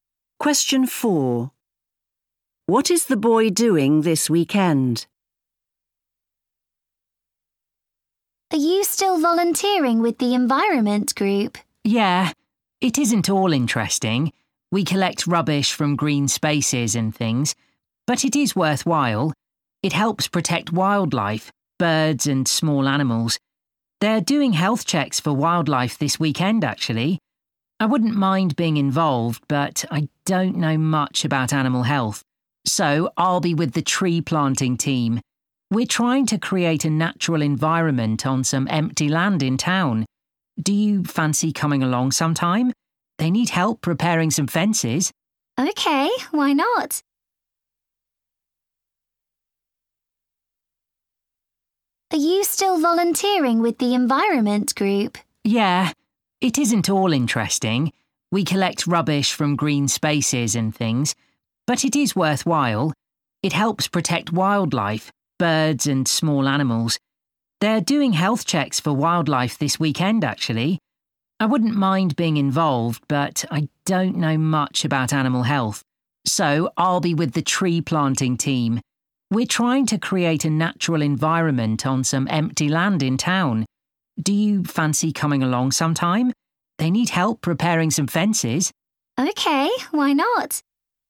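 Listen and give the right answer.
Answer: Tree planting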